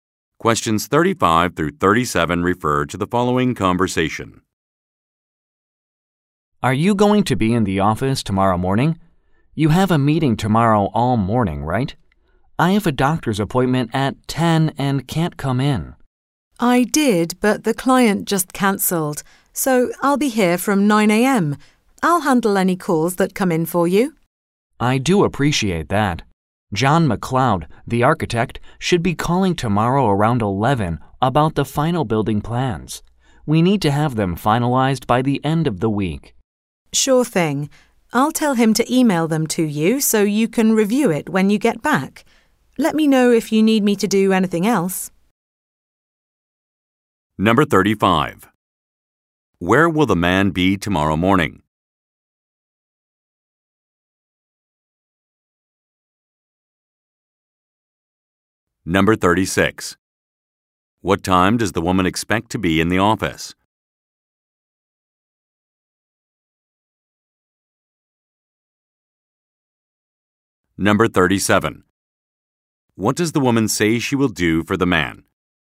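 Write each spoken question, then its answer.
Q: Where will the man be tomorrow morning?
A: At a doctor's appointment

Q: What time does the woman expect to be in the office?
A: 9 a.m.

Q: What does the woman say she will do for the man?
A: Handle any calls that come in for him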